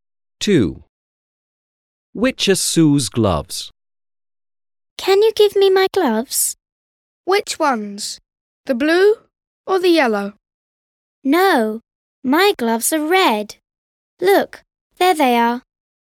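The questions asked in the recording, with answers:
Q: Which are Sue's gloves?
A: The red ones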